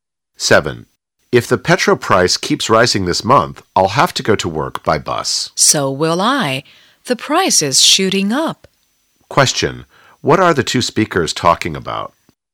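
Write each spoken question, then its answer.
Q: What are the two speakers talking about?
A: The rising petrol price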